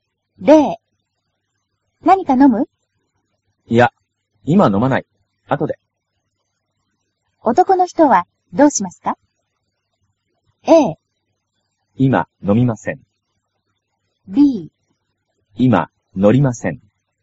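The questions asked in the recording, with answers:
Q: 男の人はどうしますか?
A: A: 今飲みません。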